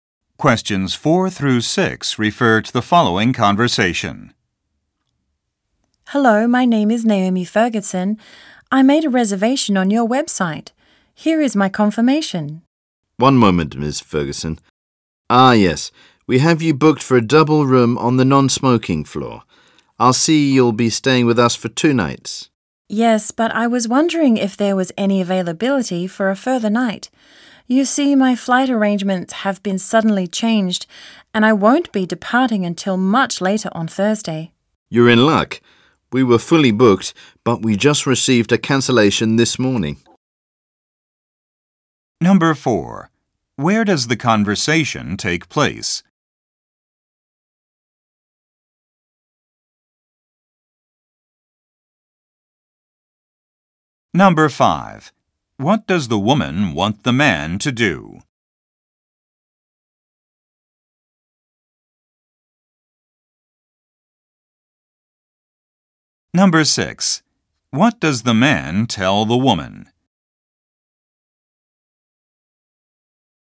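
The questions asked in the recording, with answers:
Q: Where does the conversation take place?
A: At a hotel

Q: What does the woman want the man to do?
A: Extend her stay by one more night

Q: What does the man tell the woman?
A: A room is available because of a cancellation this morning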